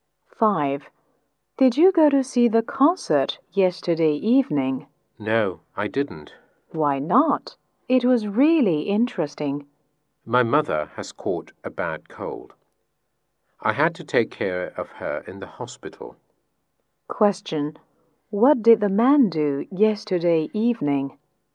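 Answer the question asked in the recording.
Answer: He took care of his mother in the hospital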